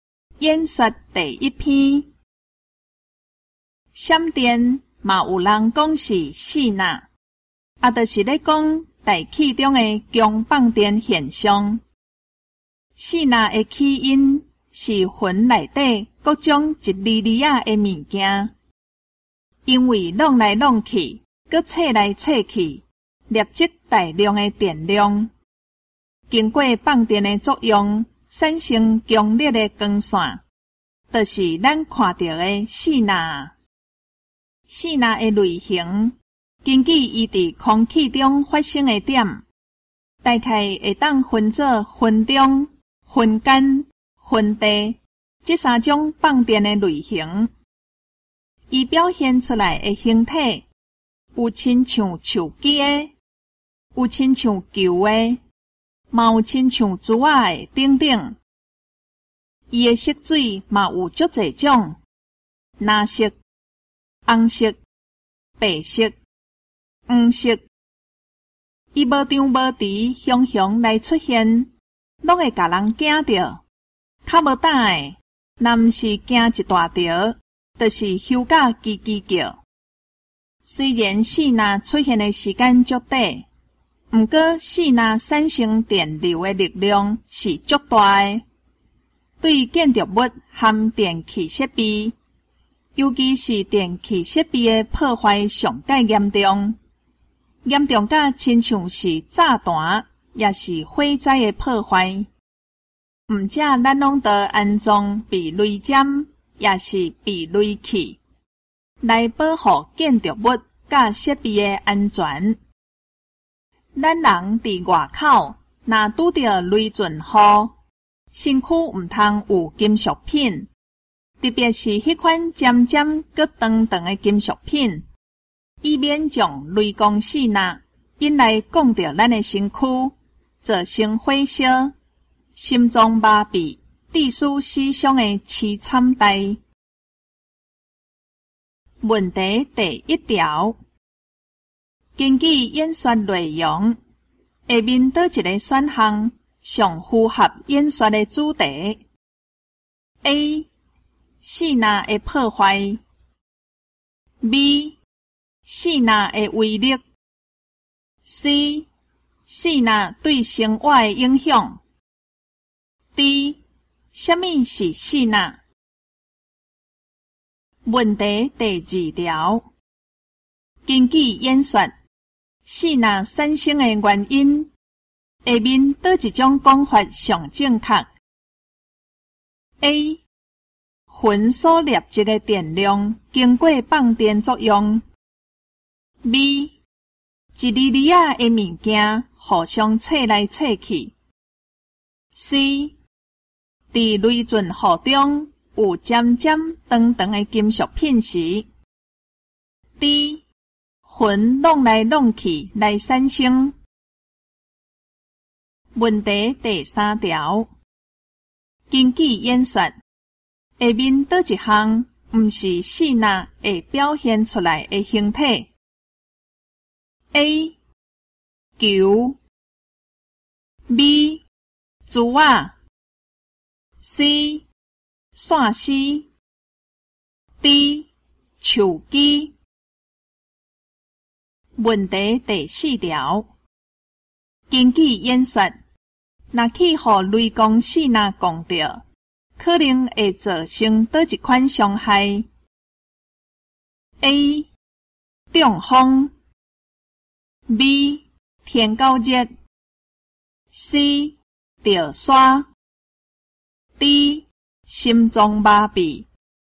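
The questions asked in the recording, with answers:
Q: 根据演说,细纳产生的原因,下面倒一种讲法上正确 ?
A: A: 魂所累积的电量经过放电作用。

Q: 根据演说,下面倒一项不是细纳会表现出来的形体。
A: C: 线丝

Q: 根据演说,若去予雷公细纳讲到,可能会造成叨一款伤害 ?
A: D: 心脏麻痹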